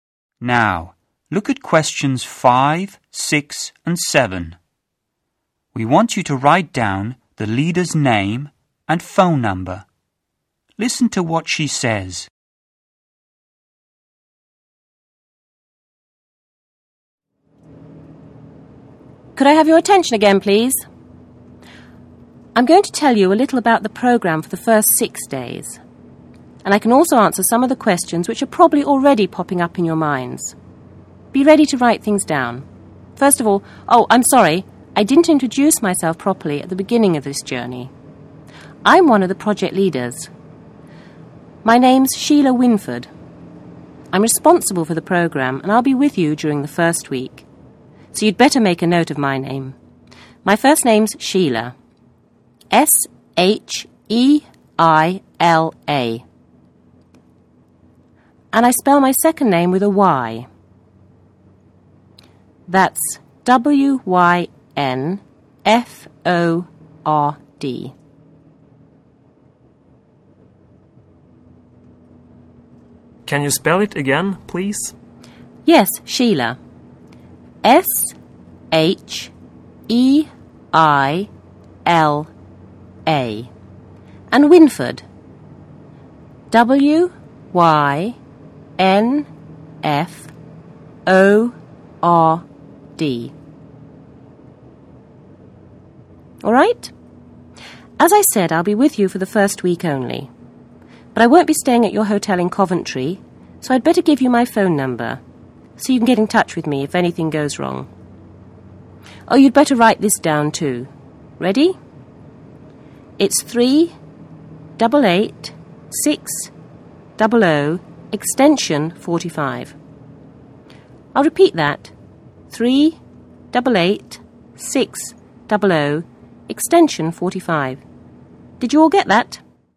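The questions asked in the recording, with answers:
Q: We want you to write down the leader's name and phone number.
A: Sheila Wynford, 388-600 extension 45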